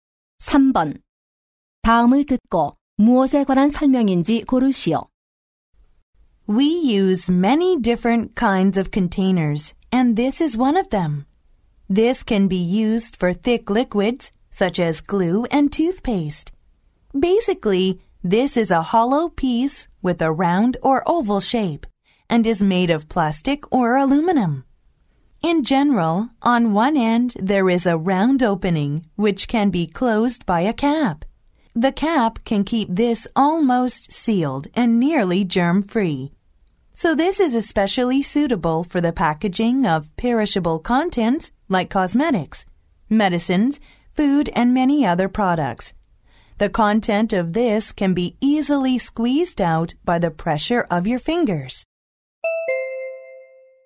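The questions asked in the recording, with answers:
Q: 다음을 듣고 무엇에 관한 설명인지 고르시오.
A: 튜브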